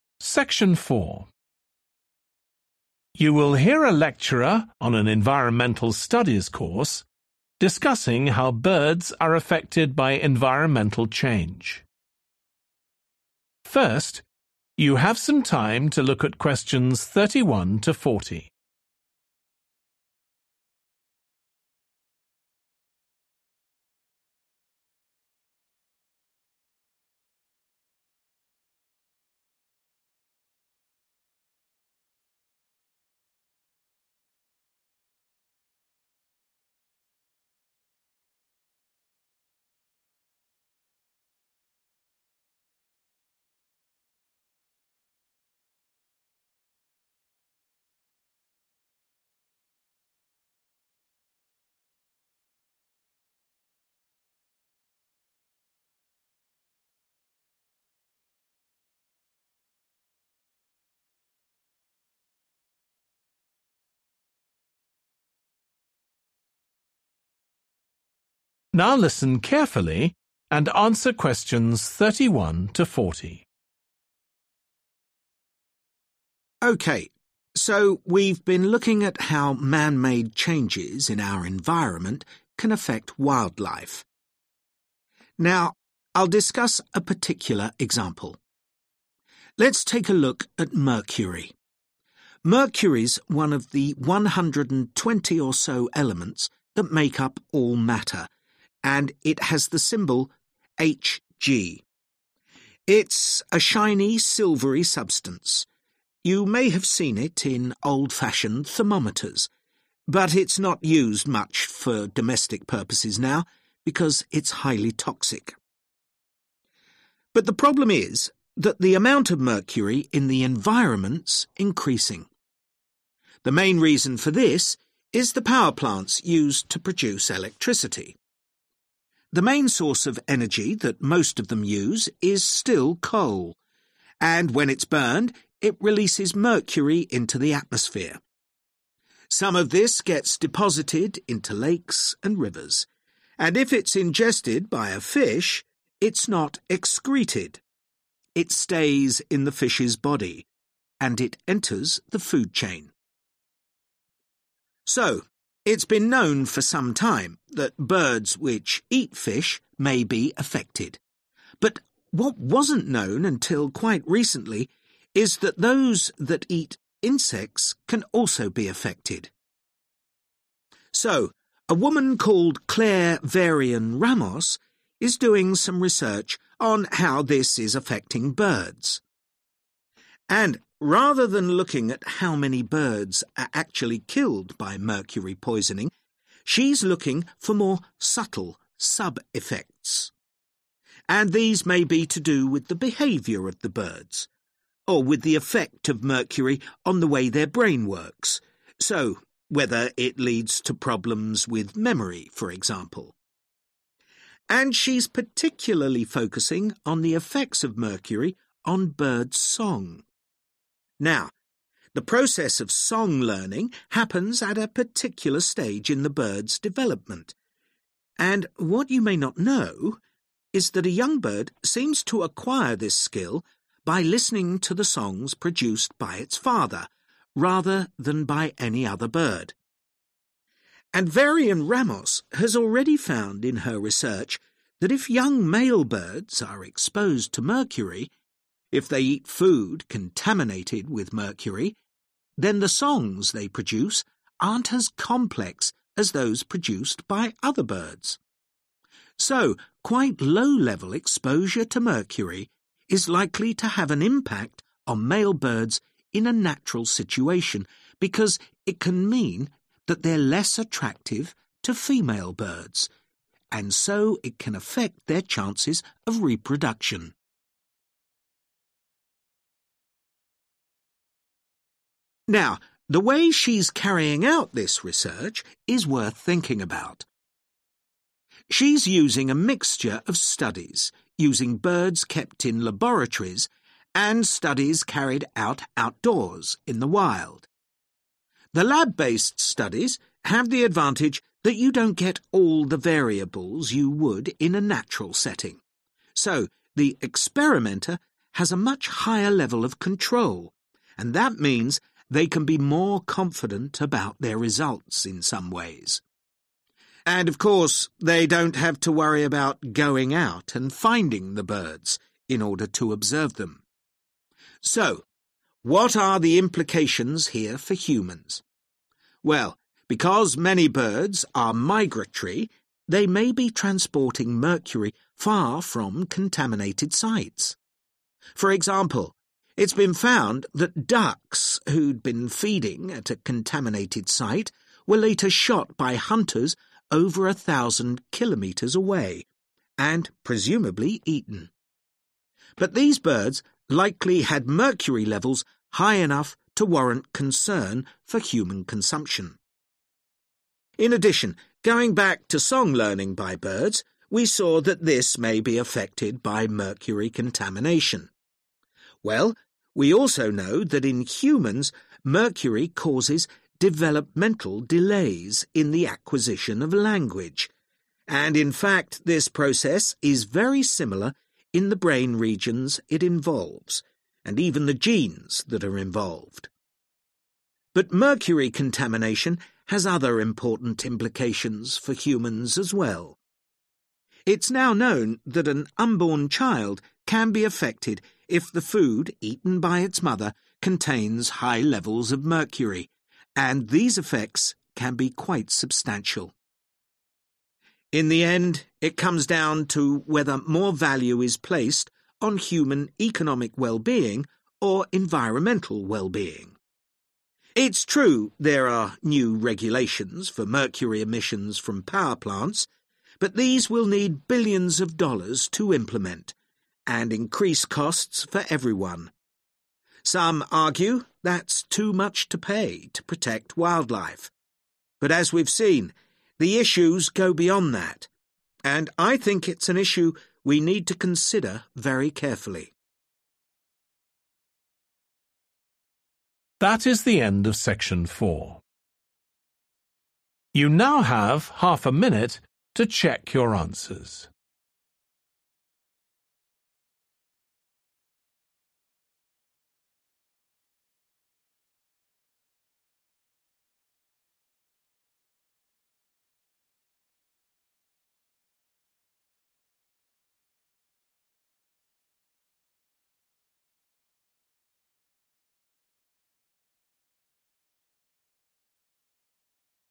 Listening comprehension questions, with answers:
Complete the notes below. Write ONE WORD ONLY for each answer.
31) It has also recently been found to affect birds which feed on 31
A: insects

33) (usually learned from a bird's 33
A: father

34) songs learned by birds exposed to mercury are less 34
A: complex

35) this may have a negative effect on birds' 35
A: reproduction

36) allow more 36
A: control

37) Migrating birds such as 37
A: duck

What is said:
OK, so we've been looking at how man-made changes in our environment can affect wildlife. Now I'll discuss a particular example. Let's take a look at mercury. Mercury's one of the 120 or so elements that make up all matter, and it has the symbol Hg. It's a shiny, silvery substance. You may have seen it in old-fashioned thermometers, but it's not used much for domestic purposes now because it's highly toxic.
But the problem is that the amount of mercury in the environment's increasing. The main reason for this is the power plants used to produce electricity. The main source of energy that most of them use is still coal, and when it's burned it releases mercury into the atmosphere. Some of this gets deposited into lakes and rivers, and if it's ingested by a fish it's not excreted, it stays in the fish's body and it enters the food chain. So it's been known for some time that birds which eat fish may be affected, but (Q31) what wasn't known until quite recently is that those that eat (=birds which feed on) insects can also be affected (điều mà chưa ai biết cho đến gần đây là những loài ăn côn trùng cũng có thể bị ảnh hưởng).
So a woman called Claire Varian-Ramos is doing some research on how this is affecting birds. And rather than looking at how many birds are actually killed by mercury poisoning, she's looking for more subtle sub-effects. (Q32) And these may be to do with the behavior of the birds, or with the effect of mercury on the way their brain works (=mental processes), so whether it leads to problems with memory, for example. And she's particularly focusing on the effects of mercury on bird song.
So quite low-level exposure to mercury is likely to have an impact (=a negative effect) on male birds in a natural situation, because it can mean that they're less attractive to female birds, and so (Q35) it can affect their chances of reproduction (nó có thể ảnh hưởng đến cơ hội sinh sản của chúng).
Now the way she's carrying out this research is worth thinking about. She's using a mixture of studies using birds kept in laboratories, and studies carried out outdoors in the wild. And of course they don't have to worry about going out and finding the birds in order to observe them.
So what are the implications here for humans? (Q37) Well, because many birds are migratory (=Migrating birds), they may be transporting mercury far from contaminated sites. For example, it's been found that ducks who'd been feeding at a contaminated site were later shot by hunters over a thousand kilometers away, and presumably eaten.
In addition, going back to song learning by birds, we saw that this may be affected by mercury contamination. Well, (Q38) we also know that in humans, mercury causes developmental delays in the acquisition of (=learning) language (chúng ta cũng biết rằng ở người, thủy ngân gây ra sự chậm phát triển trong việc tiếp thu ngôn ngữ), and in fact this process is very similar in the brain regions it involves and even the genes that are involved. But mercury contamination has other important implications for humans as well.